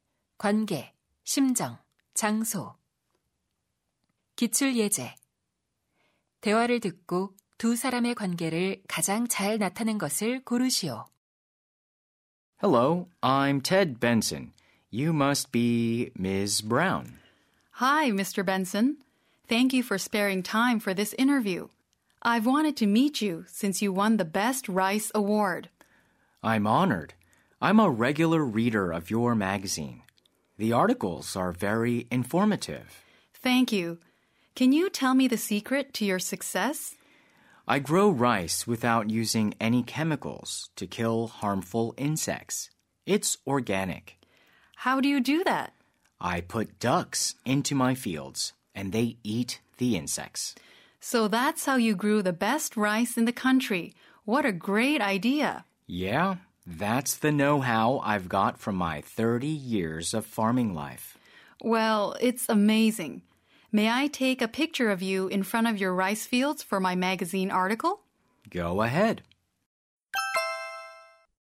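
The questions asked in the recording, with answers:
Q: 대화를 듣고 두 사람의 관계를 가장 잘 나타낸 것을 고르시오.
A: 잡지 기자 - 농부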